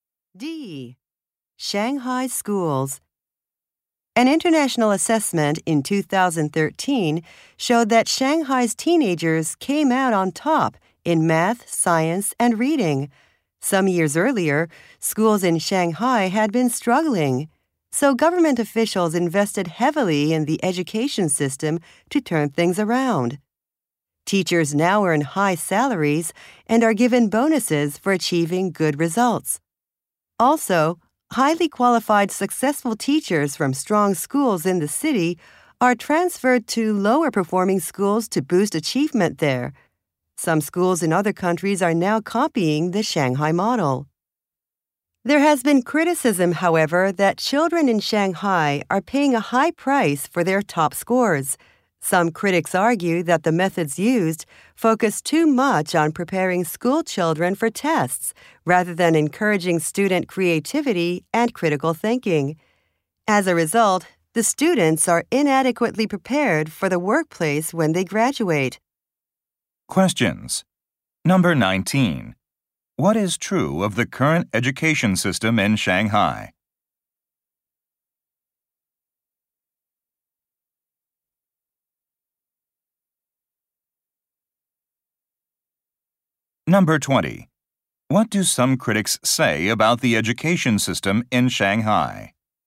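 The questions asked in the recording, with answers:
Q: What is true of the current education system in Shanghai?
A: Teachers earn high salaries and get bonuses for good results.

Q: What do some critics say about the education system in Shanghai?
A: It focuses too much on test preparation and not enough on creativity and critical thinking.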